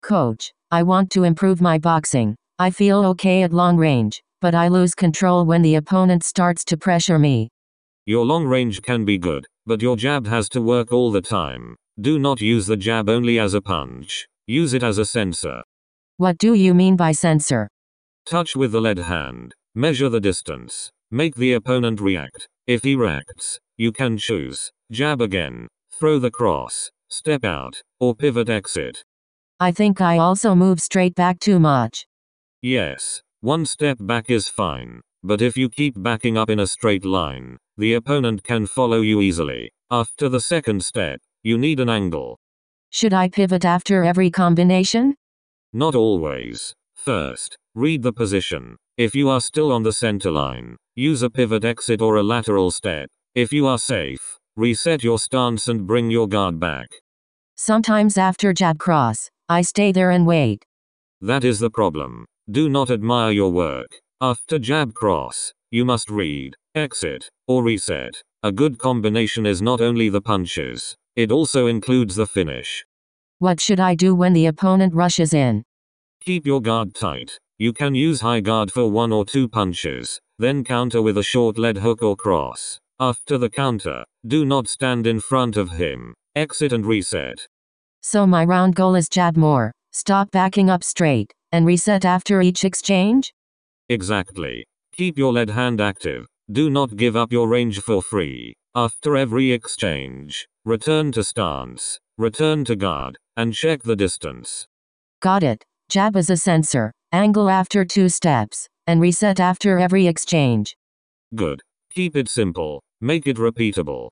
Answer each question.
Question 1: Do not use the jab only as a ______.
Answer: punch

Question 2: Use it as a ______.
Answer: sensor

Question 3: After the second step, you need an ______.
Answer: angle

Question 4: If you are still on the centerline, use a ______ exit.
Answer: pivot

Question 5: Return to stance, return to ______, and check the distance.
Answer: guard